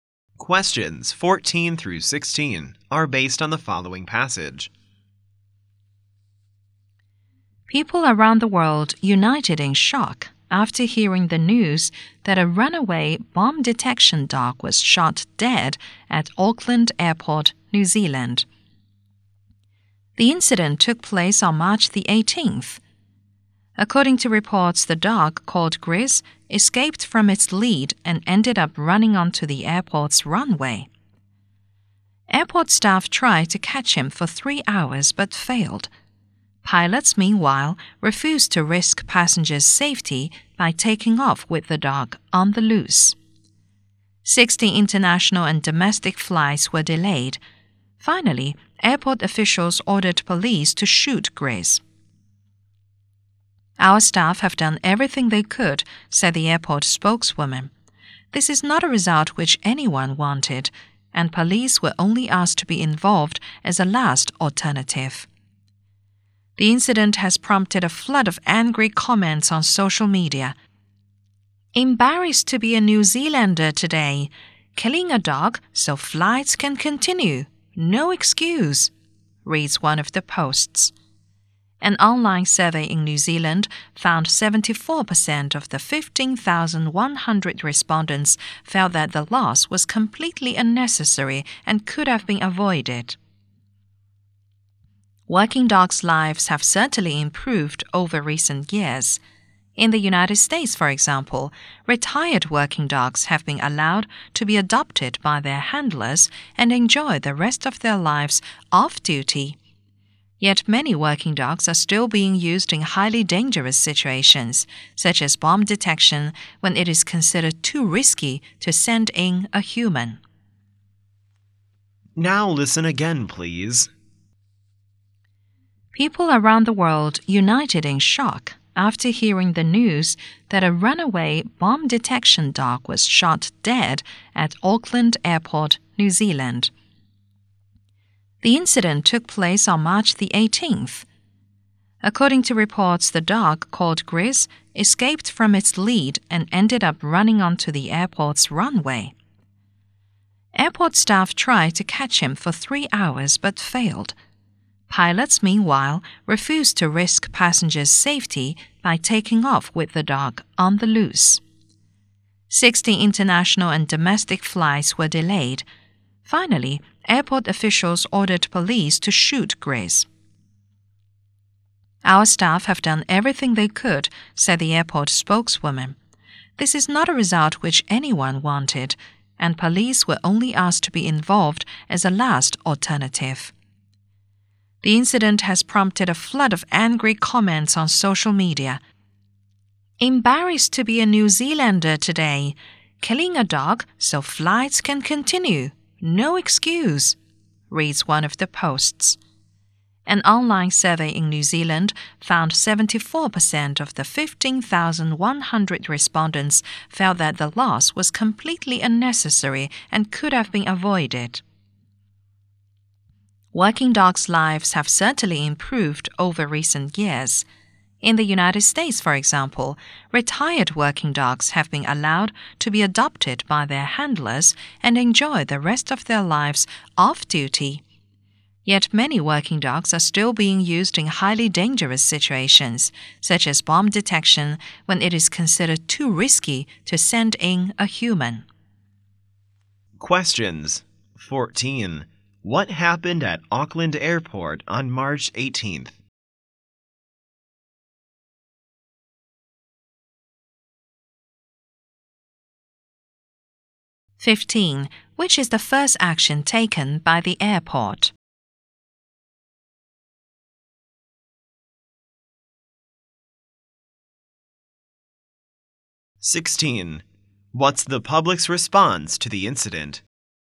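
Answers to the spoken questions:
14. A runaway bomb detection dog was shot dead
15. Staff tried to catch the dog
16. They were angry and felt the killing was unnecessary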